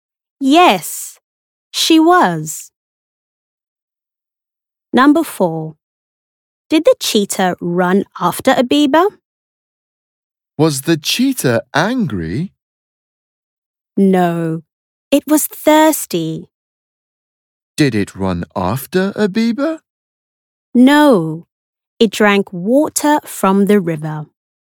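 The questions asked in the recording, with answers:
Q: Did the cheetah run after a beaver?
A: No, it drank water from the river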